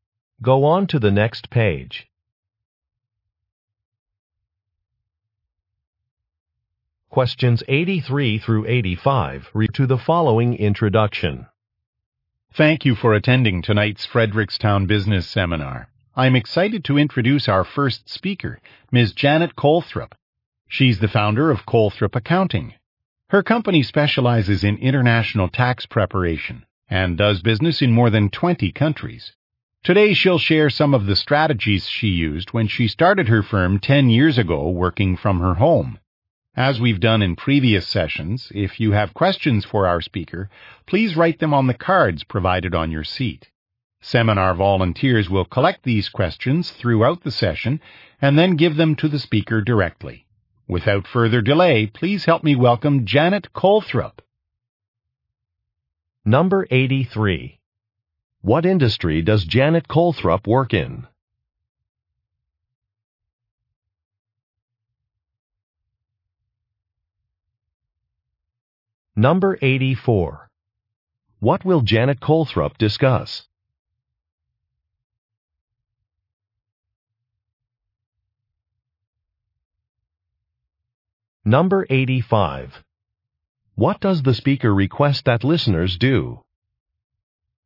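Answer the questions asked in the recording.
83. Accounting
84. Strategies she used when starting her firm
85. Write questions on the cards provided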